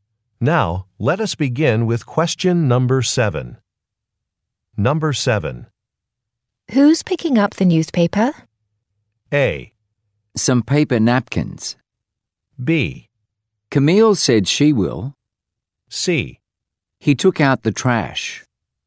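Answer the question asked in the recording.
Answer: B: Camille said she will.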